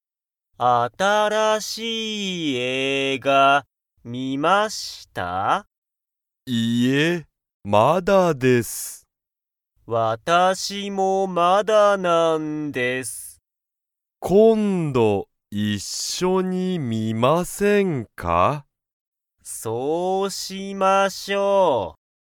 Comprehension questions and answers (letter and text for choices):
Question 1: 西川(にしかわ)さんは、その新(あたら)しい映画(えいが)を観(み)ましたか?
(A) はい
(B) いいえ)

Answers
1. (B) いいえ)

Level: Level 1